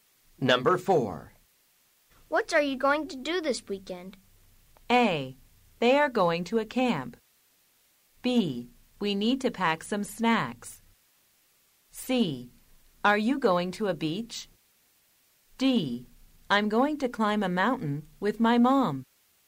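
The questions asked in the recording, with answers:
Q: What are you going to do this weekend?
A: D: I'm going to climb a mountain with my mom.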